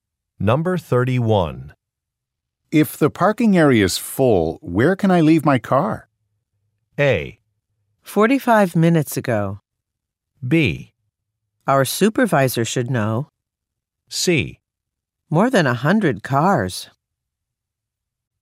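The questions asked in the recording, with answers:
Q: If the parking area is full, where can I leave my car?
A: B: Our supervisor should know.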